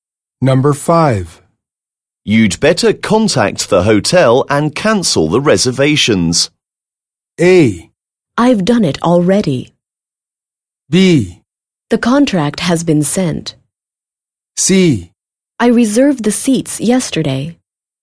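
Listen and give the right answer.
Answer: A: I've done it already.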